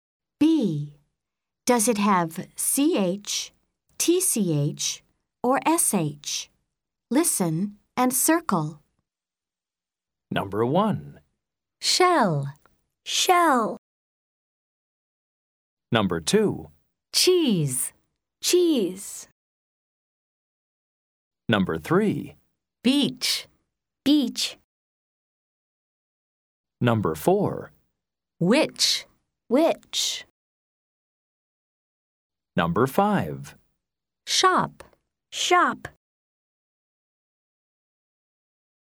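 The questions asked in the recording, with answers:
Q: Shell.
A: SH

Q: Cheese.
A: CH

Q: Beach.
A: CH

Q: Which.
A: CH

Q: Shop.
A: SH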